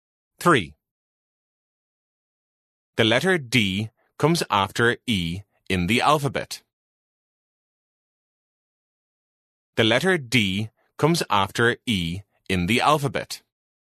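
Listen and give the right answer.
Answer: False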